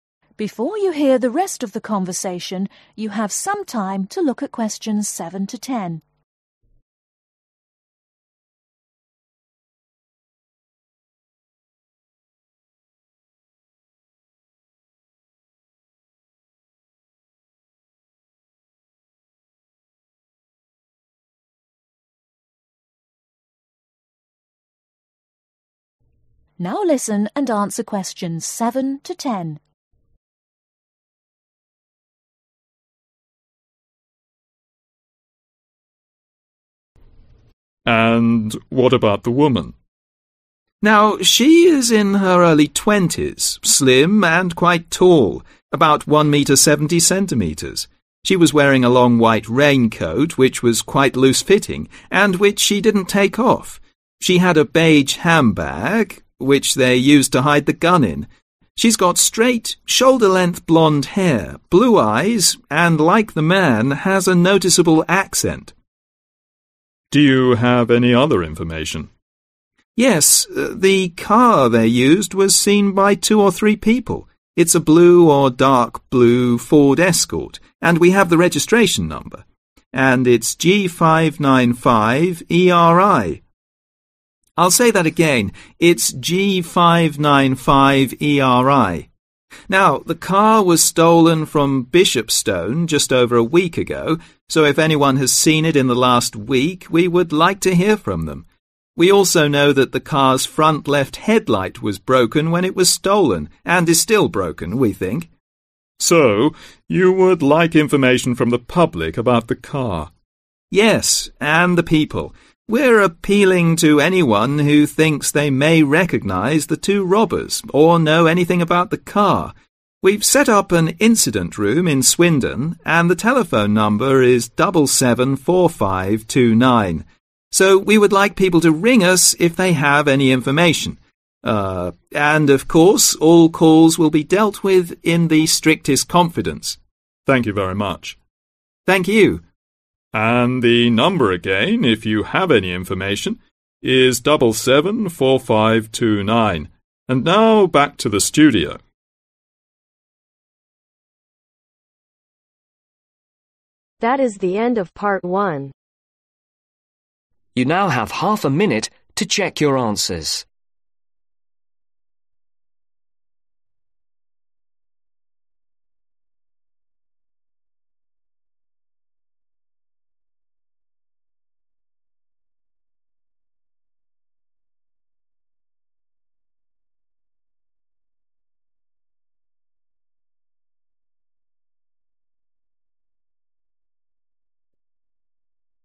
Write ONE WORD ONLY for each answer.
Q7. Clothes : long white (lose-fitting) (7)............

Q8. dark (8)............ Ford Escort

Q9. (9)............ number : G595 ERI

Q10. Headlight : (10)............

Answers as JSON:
{"7": "Raincoat", "8": "Blue", "9": "Registration", "10": "Broken"}